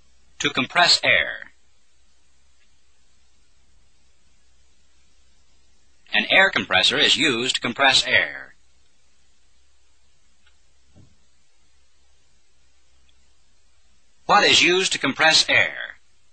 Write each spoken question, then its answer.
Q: What is used to compress air?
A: An air compressor.